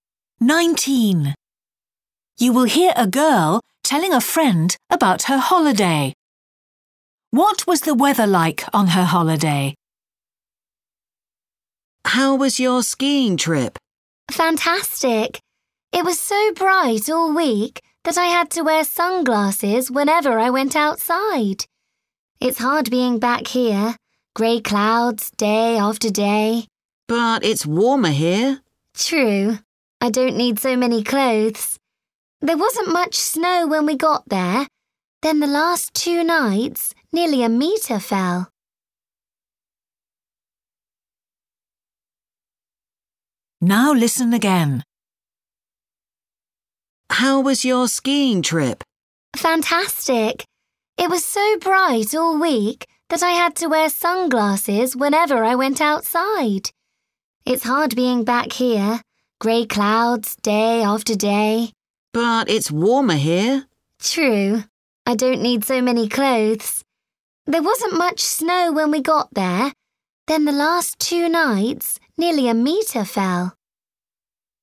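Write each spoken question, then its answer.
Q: What was the weather like on her holiday?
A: Sunny and bright all week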